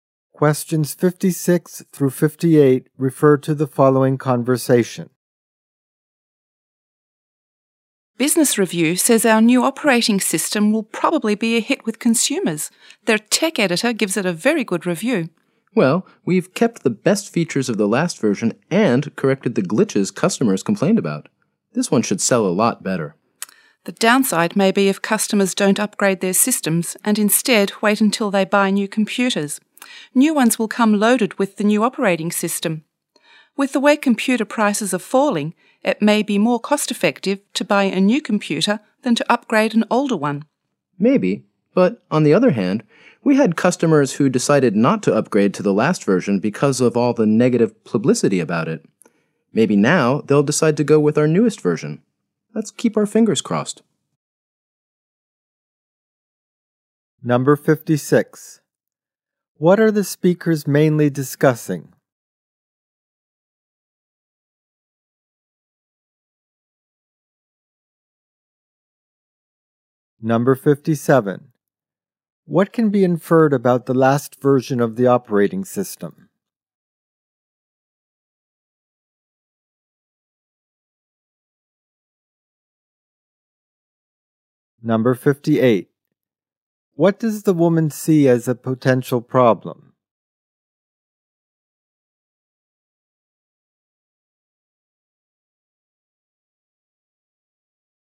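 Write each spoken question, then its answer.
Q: What are the speakers mainly discussing?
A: Their company's new operating system

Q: What can be inferred about the last version of the operating system?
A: It had glitches and got bad publicity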